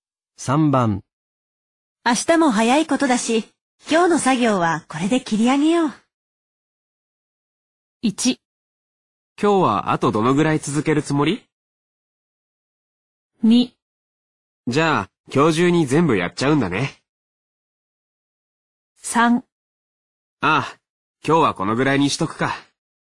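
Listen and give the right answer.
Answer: 3: ああ、今日はこのぐらいにしとくか。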